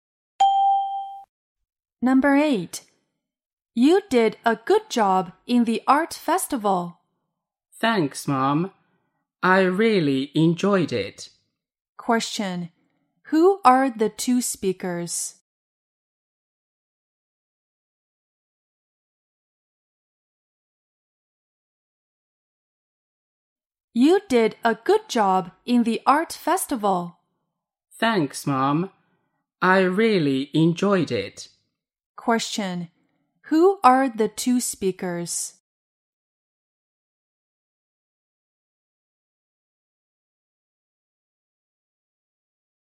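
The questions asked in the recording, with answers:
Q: Who are the two speakers?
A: Mother and child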